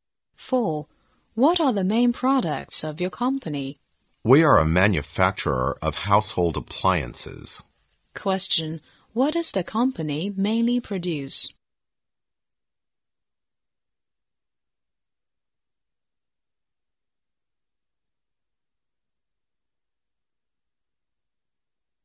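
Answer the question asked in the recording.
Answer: Household appliances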